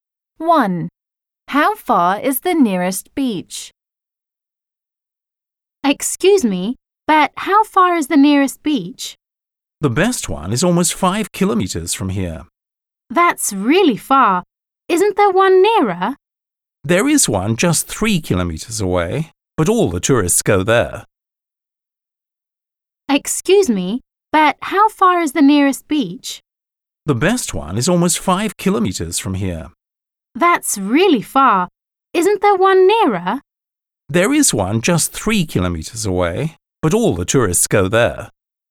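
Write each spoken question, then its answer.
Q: How far is the nearest beach?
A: 3 kilometres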